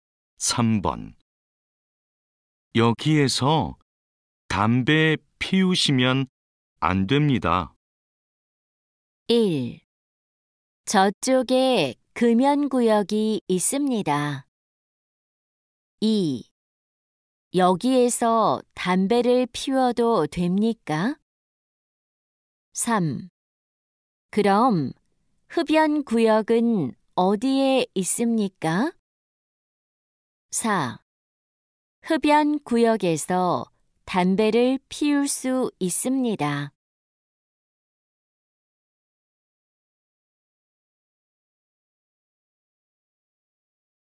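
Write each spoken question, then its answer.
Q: 여기에서 담배 피우시면 안 됩니다.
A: 3: 그럼 흡연구역은 어디에 있습니까?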